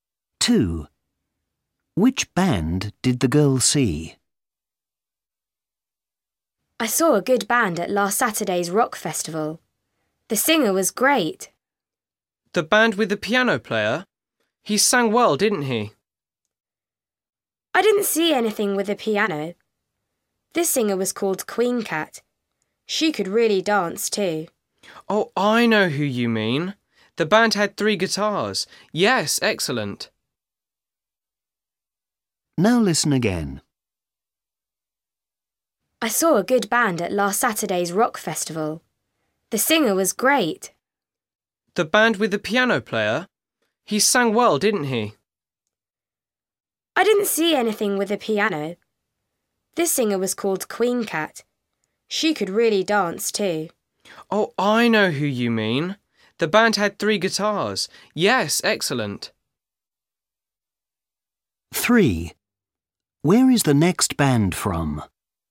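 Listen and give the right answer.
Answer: The band with Queen Cat, the singer who danced, and 3 guitars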